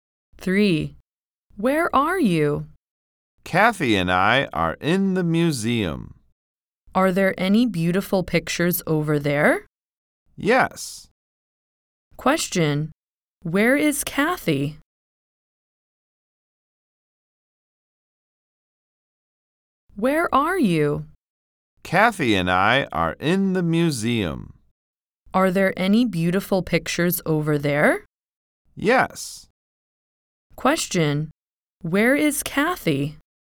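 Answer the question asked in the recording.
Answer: In the museum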